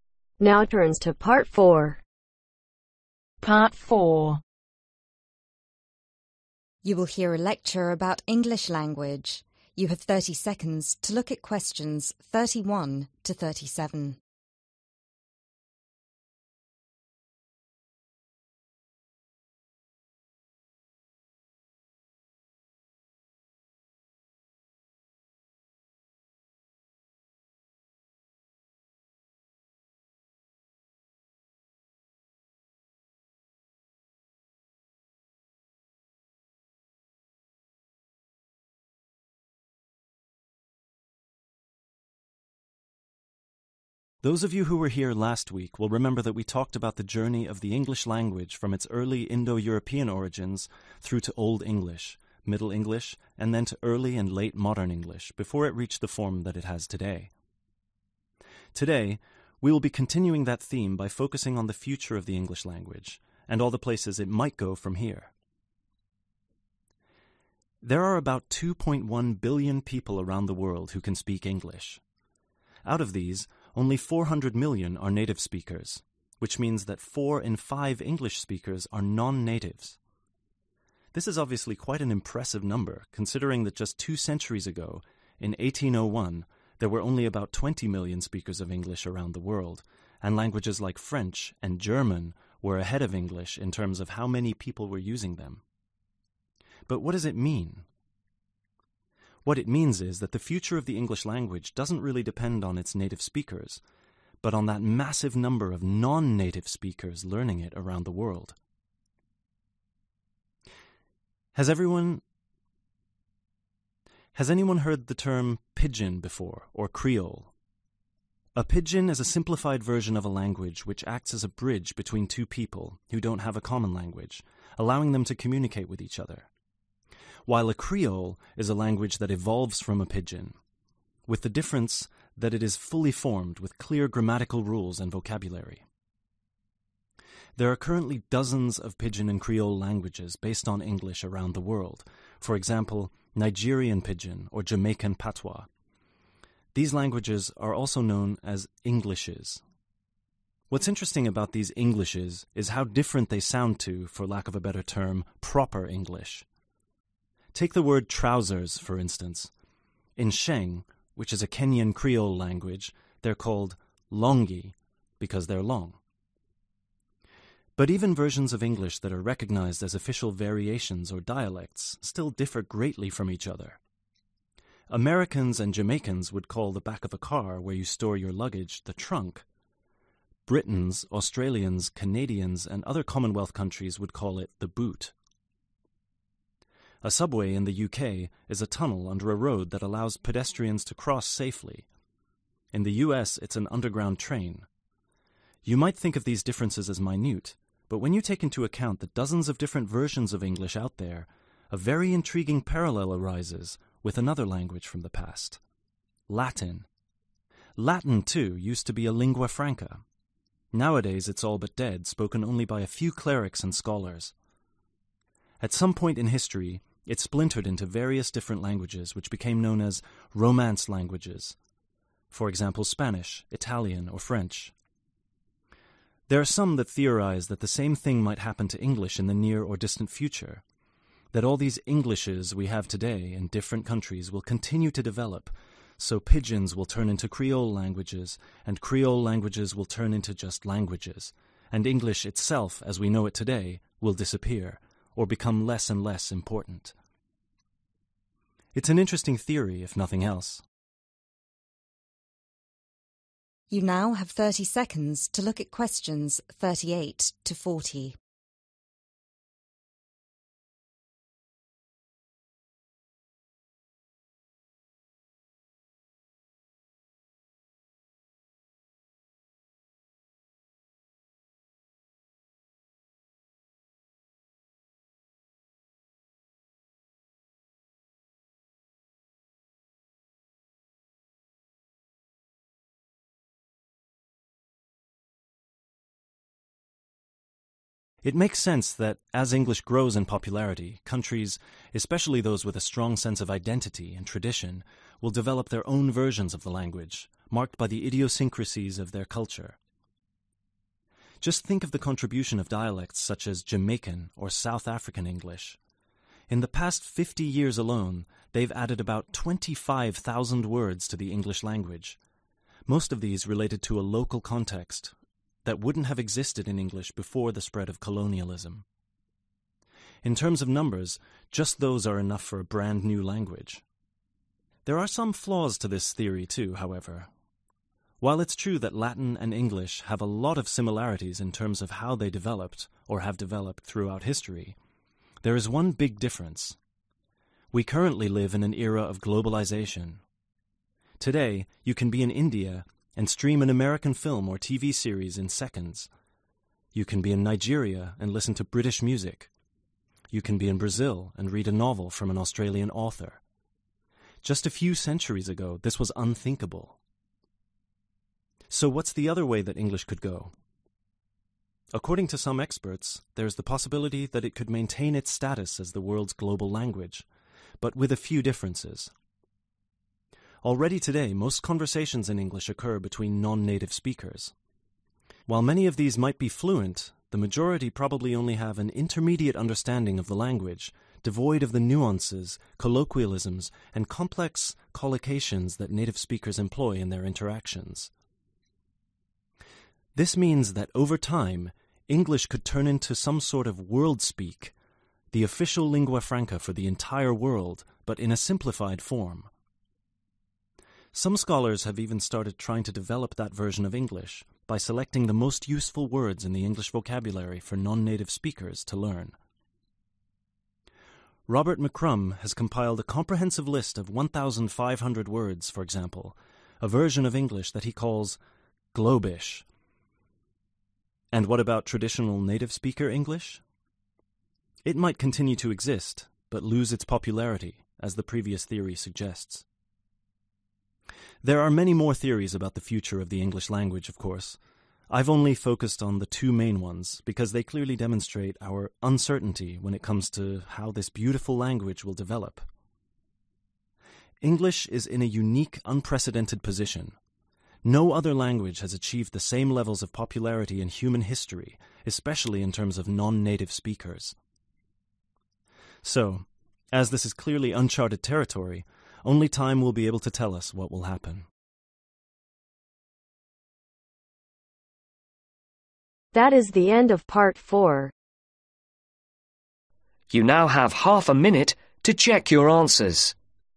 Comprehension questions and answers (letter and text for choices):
Write ONE WORD AND/OR A NUMBER for each answer.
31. How billion English speakers are there around the world today ? ............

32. Aside from French, which other language does the speaker say was more widely spoken than English in the 19th century ? ............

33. Who does the speaker believe will determine the future of English speakers ? ............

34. What is the alternative name for English pidgin and creole languages ? ............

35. What does "longi" mean ? ............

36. According to the speaker, which language has a history which is very similar to English ? ............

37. What kind of languages are Spanish, French, and Italian ? ............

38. The speaker says that Jamaican and South African English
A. are very traditional languages.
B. have greatly influenced the English language.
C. were created very recently.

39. According to the second theory mentioned by the speaker, English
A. might lose some of its more complex features in global level.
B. might become even more complicated than it is now.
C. might be called 'Globalist'.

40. English is a unique language because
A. it has the largest number of the speakers in the world.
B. it hasn't changed mush throughout human history.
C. its spoken by a largest number of non-natives than any other language.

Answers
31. 2.1
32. German
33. Non-native
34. Englishes
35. Trousers
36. Latin
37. Romance
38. B. have greatly influenced the English language.
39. A. might lose some of its more complex features in global level.
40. C. its spoken by a largest number of non-natives than any other language.